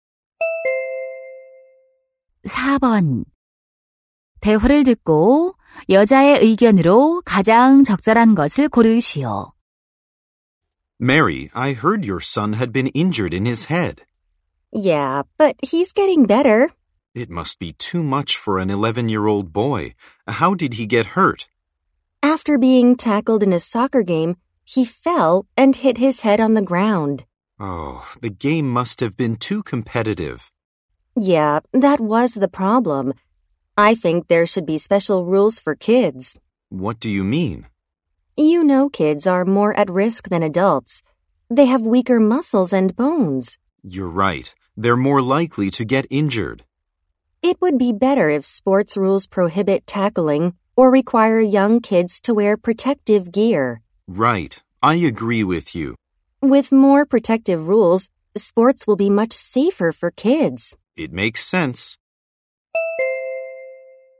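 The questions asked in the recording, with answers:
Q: 대화를 듣고 여자의 의견으로 가장 적절한 것을 고르시오.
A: 어린이를 보호하기 위한 특별한 스포츠 규칙이 필요하다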